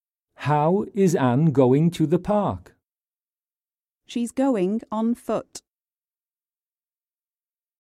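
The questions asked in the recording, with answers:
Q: How is Anne going to the park?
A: On foot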